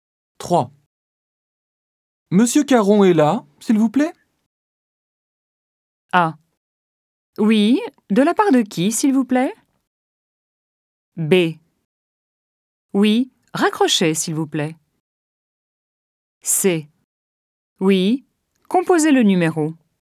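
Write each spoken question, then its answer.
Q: Monsieur Caron est là, s'il vous plaît?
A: A: Oui, de la part de qui, s'il vous plaît?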